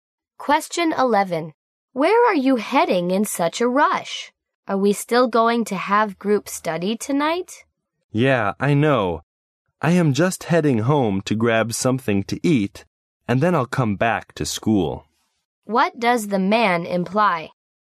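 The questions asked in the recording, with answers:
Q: What does the man imply?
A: The group study is still on; he'll come back to school after eating at home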